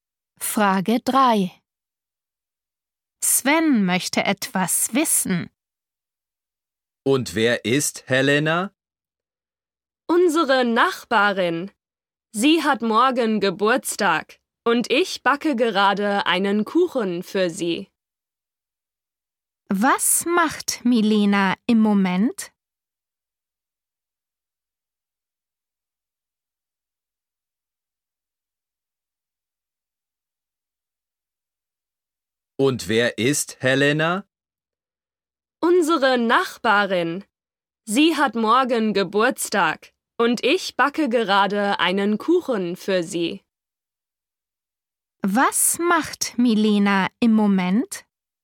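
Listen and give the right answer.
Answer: Sie backt einen Kuchen.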